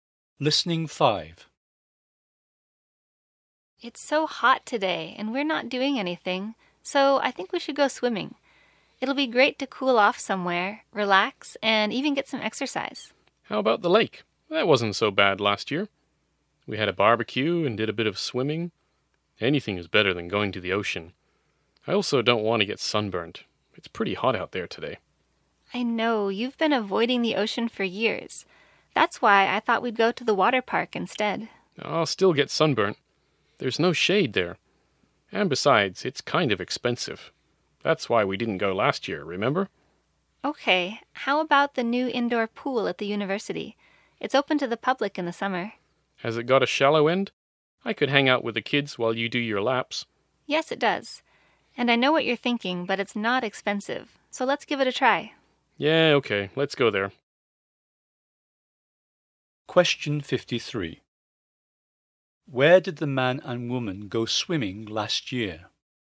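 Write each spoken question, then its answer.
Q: Where did the man and woman go swimming last year?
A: At the lake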